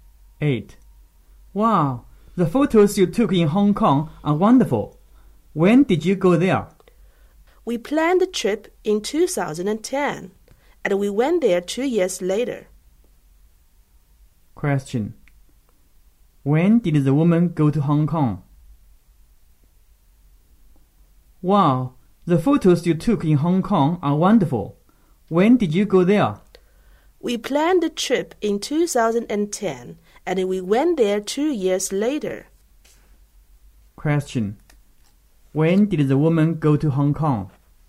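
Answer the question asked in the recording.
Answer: In 2012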